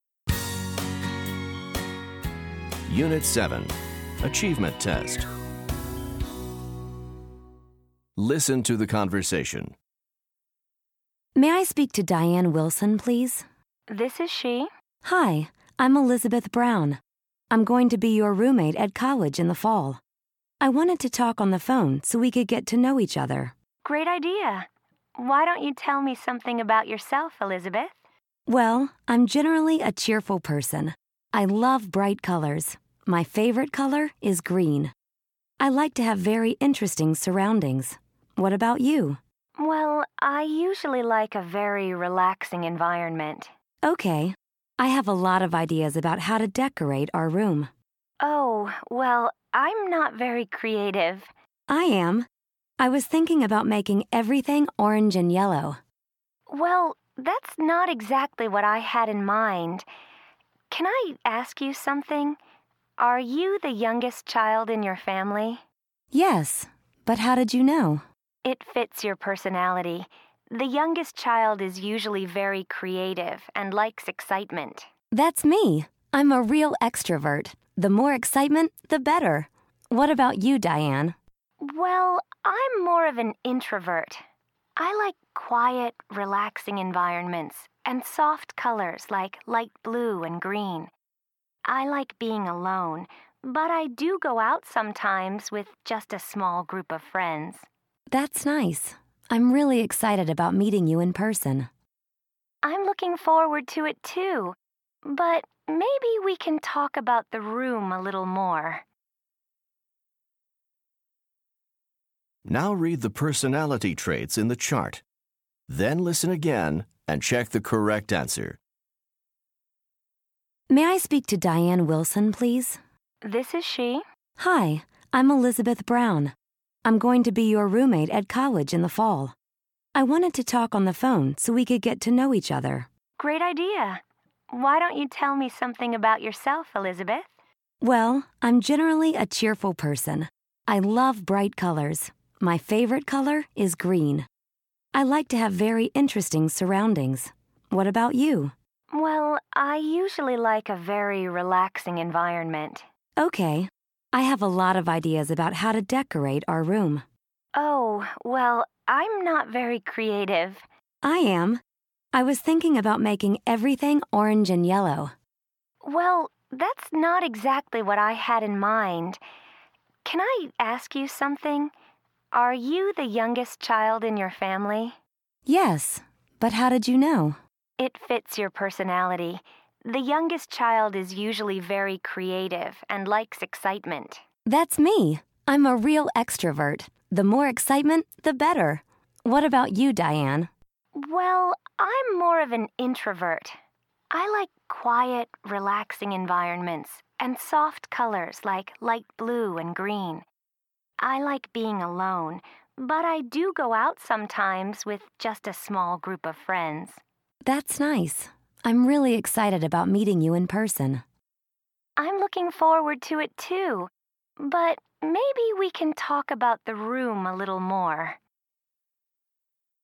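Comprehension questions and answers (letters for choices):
Listen to the conversation. Then choose the person who has each trait.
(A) Diane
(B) Elizabeth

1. favorite color is green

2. likes a calm environment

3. is creative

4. is the baby of the family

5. enjoys being alone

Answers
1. B
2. A
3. B
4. B
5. A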